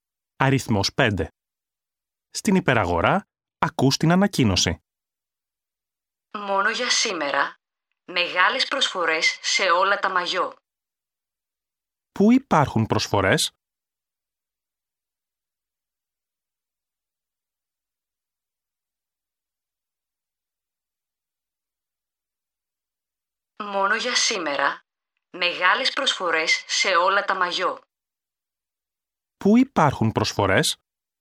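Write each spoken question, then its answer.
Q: Πού υπάρχουν προσφορές?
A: Σε όλα τα μαγιό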